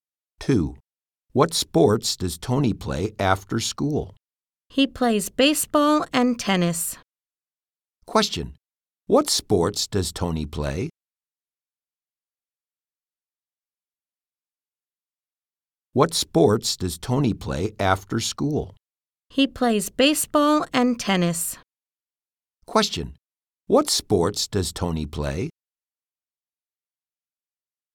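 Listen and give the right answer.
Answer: Baseball and tennis.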